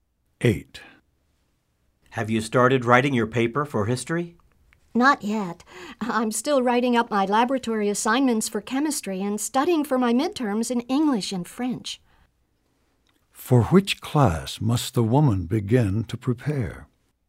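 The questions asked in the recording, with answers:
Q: For which class must the woman begin to prepare?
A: History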